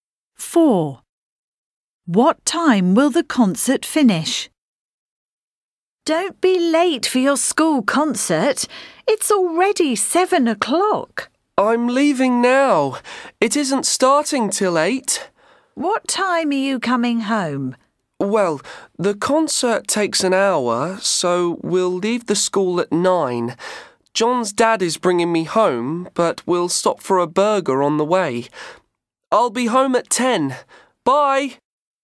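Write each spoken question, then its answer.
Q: What time will the concert finish?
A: At 9 o'clock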